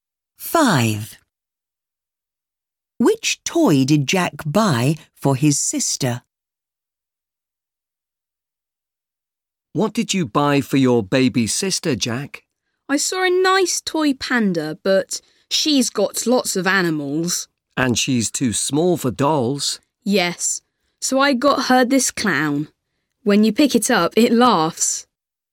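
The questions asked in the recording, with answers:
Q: Which toy did Jack buy for his sister?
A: A clown that laughs.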